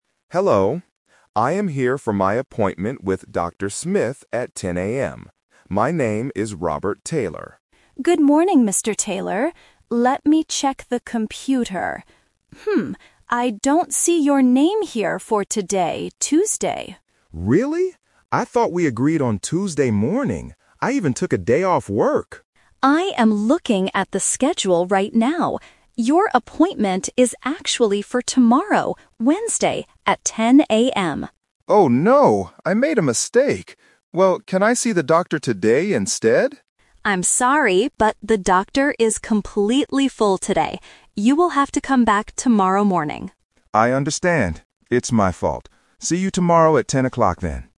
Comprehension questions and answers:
Listen to the conversation and choose the correct answer (A, B, or C).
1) What day is it today?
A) Monday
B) Tuesday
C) Wednesday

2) When is Mr. Taylor's real appointment?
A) Tuesday at 10:00 AM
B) Wednesday at 10:00 AM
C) Thursday at 10:00 AM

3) Why can't Mr. Taylor see the doctor today?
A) He has to go to work.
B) The doctor is not working today.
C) The doctor is completely full.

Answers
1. B) Tuesday
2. B) Wednesday at 10:00 AM
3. C) The doctor is completely full.

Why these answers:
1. The nurse says, "I don't see your name here for today, Tuesday." Option (A) is not mentioned. Option (C) is a trap because Wednesday is the day of his actual appointment, not today.
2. The nurse clearly tells him, "Your appointment is actually for tomorrow, Wednesday, at 10:00 AM." Option (A) is a trap because Tuesday at 10:00 AM is the time Mr. Taylor thought he had an appointment. Option (C) is not mentioned in the audio.
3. The nurse says, "the doctor is completely full today," meaning there is no free time. Option (A) is a trap because Mr. Taylor actually "took a day off work" (so he doesn't have to work). Option (B) is a trap because the doctor is working, but just too busy to see an extra patient.

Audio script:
Patient: Hello. I am here for my appointment with Dr. My name is Robert Taylor.
Nurse: Good morning, Mr. Taylor. Let me check the computer... Hmm, I don't see your name here for today, Tuesday.
Patient: Really? I thought we agreed on Tuesday morning. I even took a day off work!
Nurse: I am looking at the schedule right now. Your appointment is actually for tomorrow, Wednesday, at 10:00 AM.
Patient: Oh, no! I made a mistake. Well, can I see the doctor today instead?
Nurse: I'm sorry, but the doctor is completely full today. You will have to come back tomorrow morning.
Patient: I understand. It's my fault. See you tomorrow at 10:00, then.

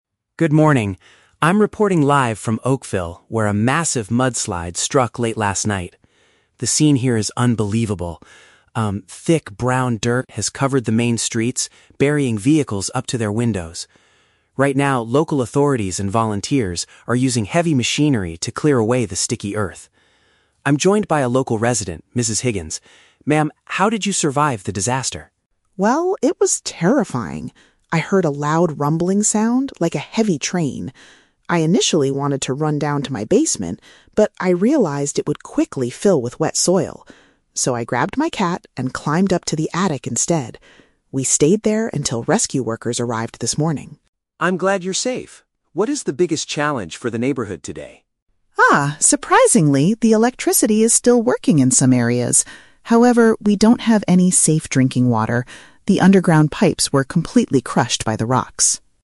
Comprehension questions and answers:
Listen to a live news report and a short interview, then choose the correct answer (A, B, or C) for each question.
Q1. What are the workers and volunteers currently doing in the town?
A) Removing the wet soil from the roads.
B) Pulling trapped cars out of the ground.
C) Rebuilding the damaged wooden houses.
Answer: A) Removing the wet soil from the roads.

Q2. Where did Mrs. Higgins go to protect herself during the incident?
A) The underground floor of her property.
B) A local emergency shelter in the town.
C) The highest room right below her roof.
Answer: C) The highest room right below her roof.

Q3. According to Mrs. Higgins, what is the main problem the town is facing now?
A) A total loss of electrical power.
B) A lack of fresh liquid for consumption.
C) A shortage of heavy rescue equipment.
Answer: B) A lack of fresh liquid for consumption.

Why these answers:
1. The reporter mentions that people are using machinery to "clear away the sticky earth" from the "main streets". "Removing the wet soil from the roads" is a paraphrase of this action.
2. Mrs. Higgins states she "climbed up to the attic instead." The "highest room right below her roof" is a definition/paraphrase of an attic.
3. Mrs. Higgins says, "we don't have any safe drinking water" because the pipes were crushed. "A lack of fresh liquid for consumption" is a paraphrase of not having safe drinking water.

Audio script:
Tom: Good morning. I'm reporting live from Oakville, where a massive mudslide struck late last night. The scene here is unbelievable. Um, thick brown dirt has covered the main streets, burying vehicles up to their windows. Right now, local authorities and volunteers are using heavy machinery to clear away the sticky earth. I'm joined by a local resident, Mrs. Higgins. Ma'am, how did you survive the disaster?
Mrs. Higgins: Well, it was terrifying. I heard a loud rumbling sound, like a heavy train. I initially wanted to run down to my basement, but I realized it would quickly fill with wet soil. So, I grabbed my cat and climbed up to the attic instead. We stayed there until rescue workers arrived this morning.
Tom: I'm glad you're safe. What is the biggest challenge for the neighborhood today?
Mrs. Higgins: Ah, surprisingly, the electricity is still working in some areas. However, we don't have any safe drinking water. The underground pipes were completely crushed by the rocks.

